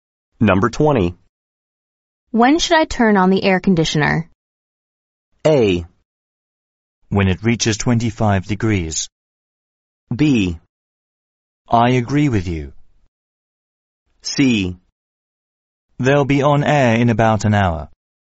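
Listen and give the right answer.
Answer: A: When it reaches 25 degrees.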